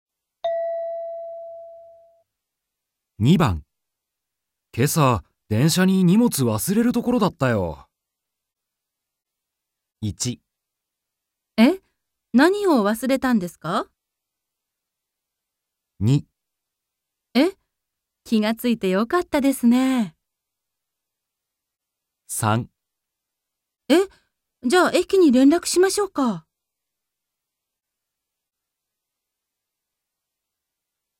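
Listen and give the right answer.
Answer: 2. え? 気がついてよかったですね。

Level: N2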